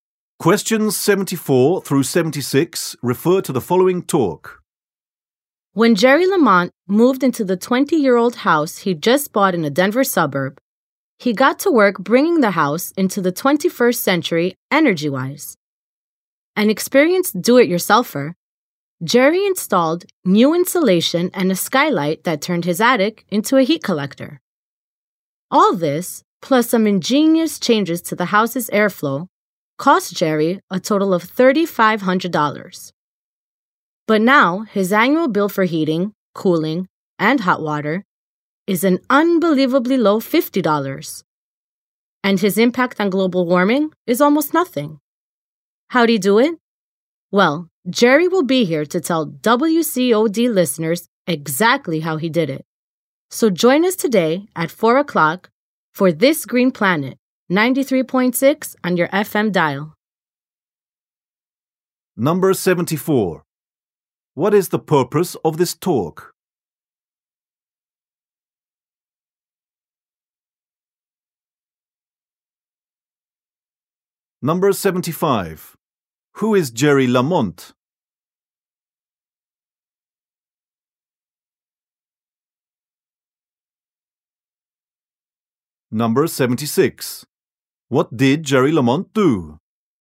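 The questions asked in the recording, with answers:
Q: What is the purpose of this talk?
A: To promote an upcoming radio program

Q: Who is Jerry Lamont?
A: A homeowner and experienced do-it-yourselfer

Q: What did Jerry Lamont do?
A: Made his house energy-efficient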